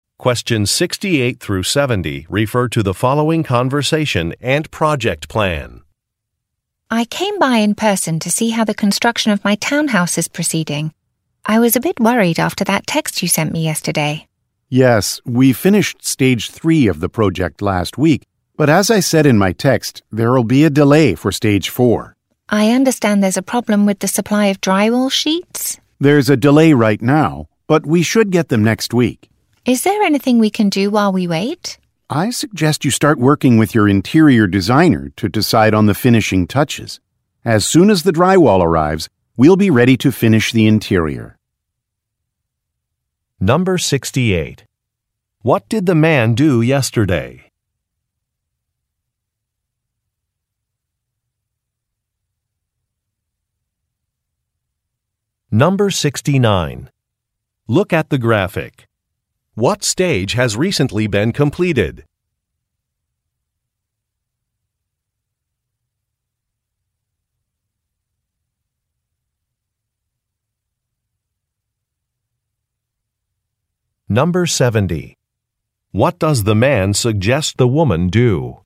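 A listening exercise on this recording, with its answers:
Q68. What did the man do yesterday?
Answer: Communicated with the woman about the schedule

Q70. What does the man suggest the woman do?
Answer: Make some design decisions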